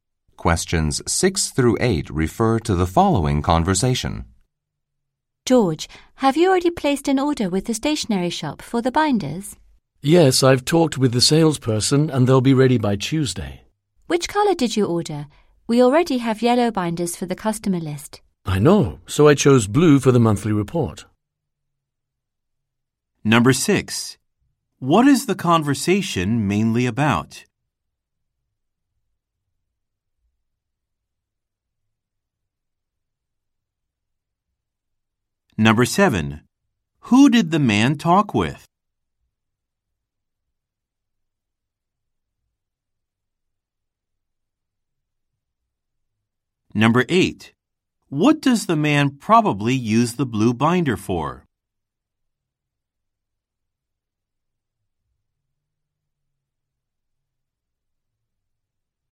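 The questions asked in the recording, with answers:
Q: What is the conversation mainly about?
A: Ordering binders from the stationery shop

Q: Who did the man talk with?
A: The salesperson

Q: What does the man probably use the blue binder for?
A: The monthly report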